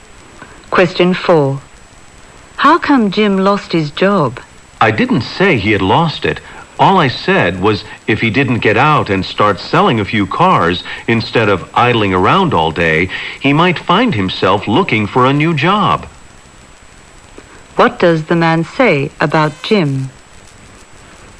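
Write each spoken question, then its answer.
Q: What does the man say about Jim?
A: Jim may lose his job if he doesn't start selling cars.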